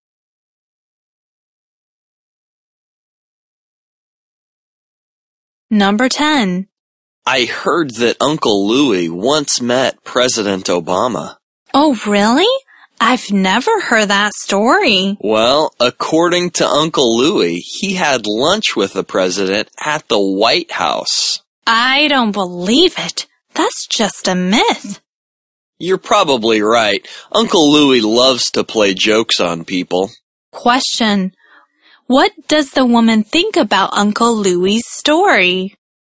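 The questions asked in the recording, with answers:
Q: what does the woman think about Uncle Louie's story?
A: It's just a myth; she doesn't believe it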